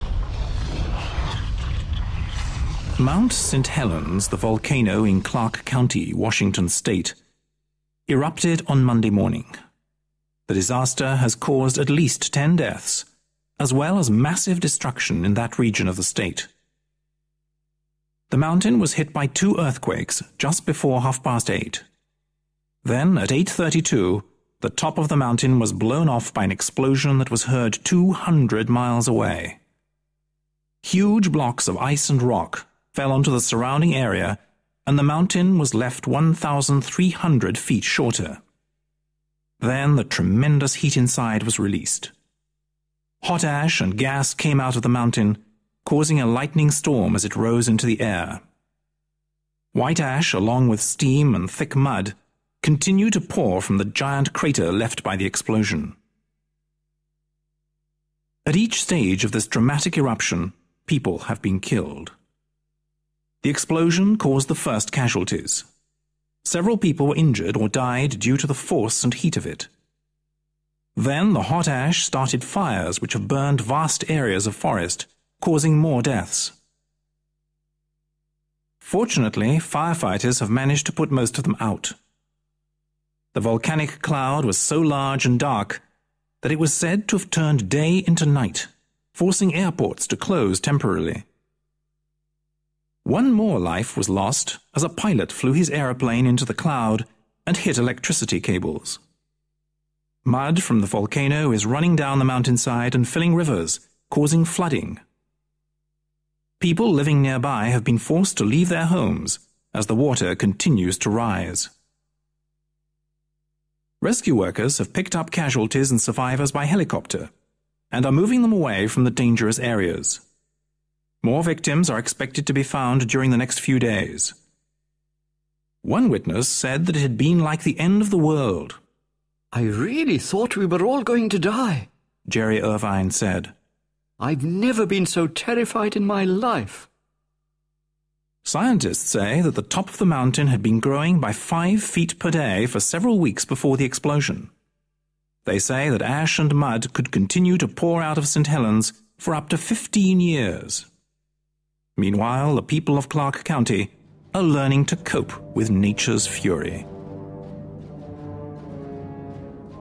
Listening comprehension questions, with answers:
Read the sentences below then listen and put them in the correct chronological order.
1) The tremendous heat inside was released.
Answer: 4 a

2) Mud from the volcano is filling rivers, causing flooding.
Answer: 7 b

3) The top of the mountain was blown off.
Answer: 2 c

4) Huge blocks of ice and rock fell onto the surrounding area.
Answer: 3 d

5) The mountain was hit by two earthquakes.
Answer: 1 e

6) The hot ash started fires.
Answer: 6 f

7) Hot ash and gas came out of the mountain causing a lightning storm.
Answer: 5 g

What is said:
Mount St Helens, the volcano in Clark County, Washington State, erupted on Monday morning. The disaster has caused at least ten deaths as well as massive destruction in that region of the state.
The mountain was hit by two earthquakes just before half past eight. Then, at eight thirty-two, the top of the mountain was blown off by an explosion that was heard two hundred miles away. Huge blocks of ice and rock fell onto the surrounding area and the mountain was left 1,300 feet shorter. Then the tremendous heat inside was released. Hot ash and gas came out of the mountain, causing a lightning storm as it rose into the air. White ash, along with steam and think mud, continue to pour from the giant crater left by the explosion.
At each stage of this dramatic eruption people have been killed. The explosion caused the first casualties; several people were injured or died due to the force and heat of it. Then the hot ash started fires which have burned vast areas of forest, causing more deaths. Fortunately, fire-fighters have managed to put most of them out. The volcanic cloud was so large and dark that it was said to have turned day into night, forcing airports to close temporarily. One more life was lost as a pilot flew his aeroplane into the cloud and hit electricity cables. Mud from the volcano is running down the mountainside and filling rivers, causing flooding. People living nearby have been forced to leave their homes as the water continues to rise.
Rescue workers have picked up casualties and survivors by helicopter, and are moving them away from the dangerous areas. More victims are expected to be found during the next few days. One witness said that it had been like the end of the world. "I really thought we were all going to die," Jerry Irvine said. "I've never been so terrified in my life."
Scientists say that the top of the mountain had been 'growing' by five feet per day for several weeks before the explosion. They say that ash and mud could continue to pour out of St. Helens for up to fifteen years. Meanwhile, the people of Clark County are learning to cope with nature's fury.